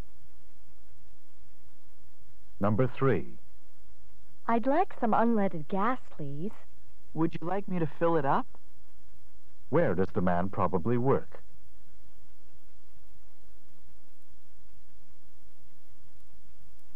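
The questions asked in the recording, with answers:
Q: Where does the man probably work?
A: At a gas station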